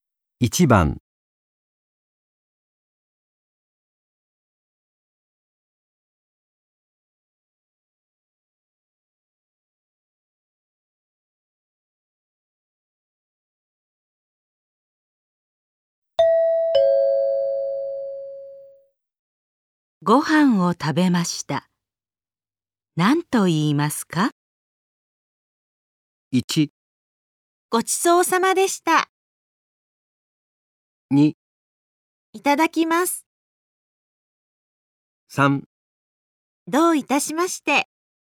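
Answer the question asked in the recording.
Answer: 1: ごちそうさまでした。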